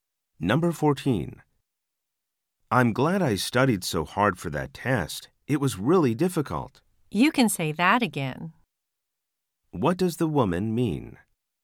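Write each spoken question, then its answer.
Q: What does the woman mean?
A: She agrees the test was very difficult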